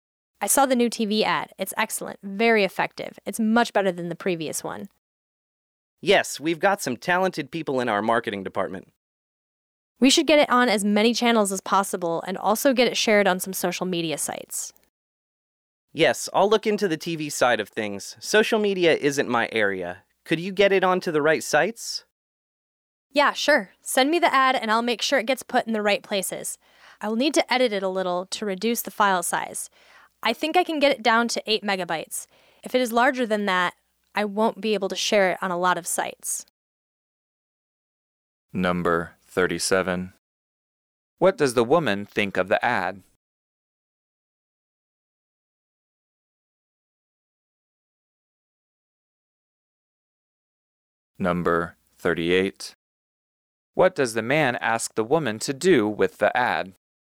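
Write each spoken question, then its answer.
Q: What does the woman think of the ad?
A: It is very effective, much better than the previous one

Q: What does the man ask the woman to do with the ad?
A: Share it on social media sites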